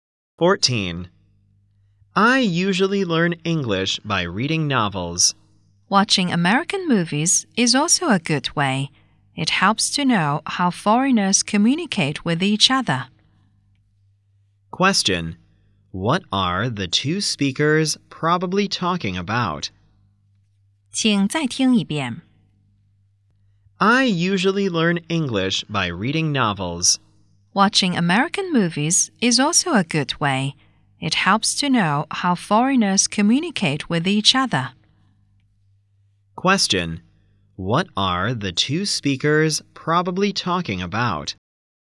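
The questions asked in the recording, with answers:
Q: Question: What are the two speakers probably talking about?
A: Ways to learn English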